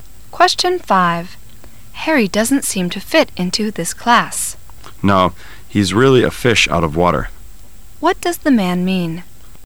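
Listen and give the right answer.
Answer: Harry doesn't feel at home in the class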